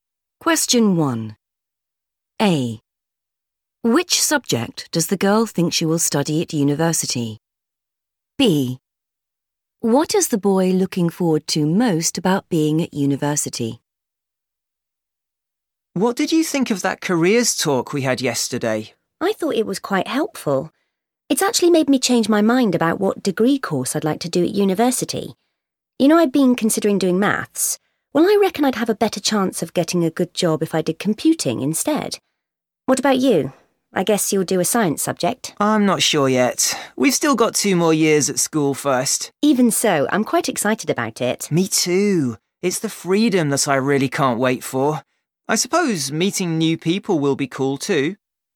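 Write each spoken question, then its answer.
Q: What is the boy looking forward to most about being at university?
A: the freedom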